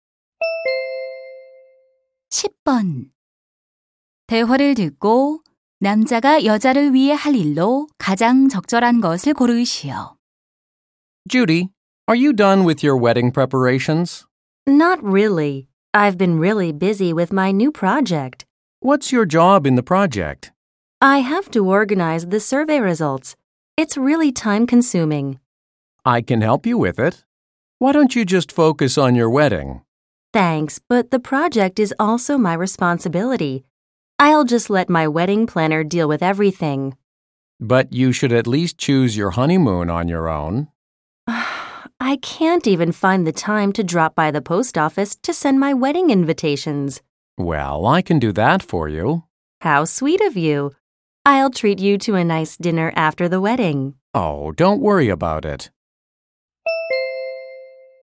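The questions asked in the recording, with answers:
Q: 대화를 듣고 남자가 여자를 위해 할 일로 가장 적절한 것을 고르시오.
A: 우체국에 가서 청첩장 부치기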